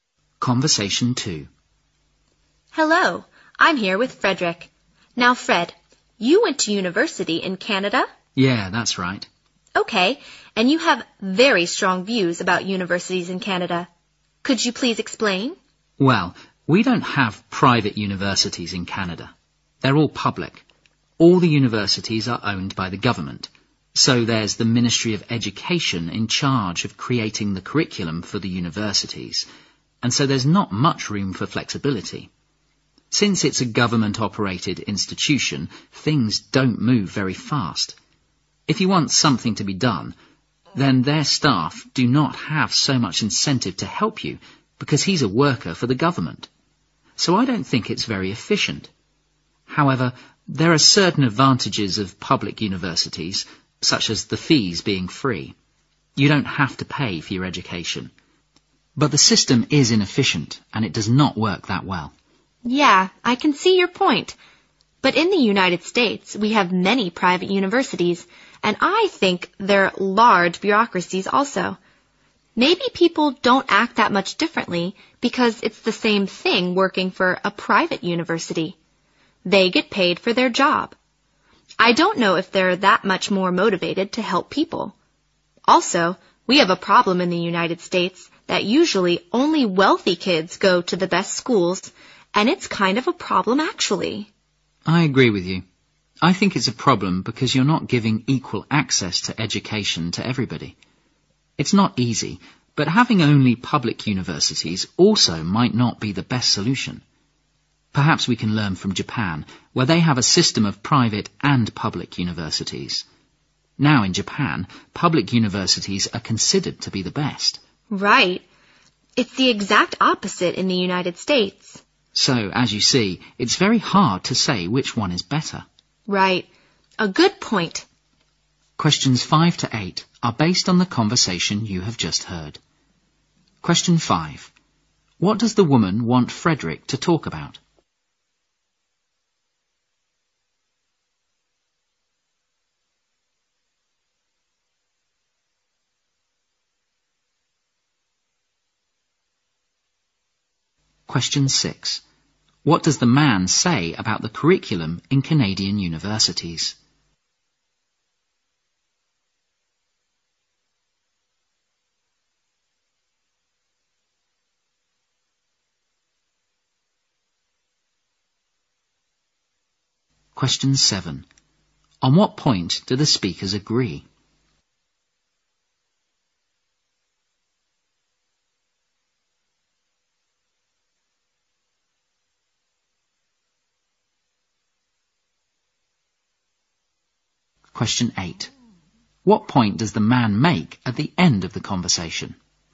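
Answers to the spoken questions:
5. His views about universities in Canada
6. It is created by the Ministry of Education, so there is little flexibility
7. Not everyone has equal access to education in the US; only wealthy kids go to the best schools
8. It is hard to say whether public or private universities are better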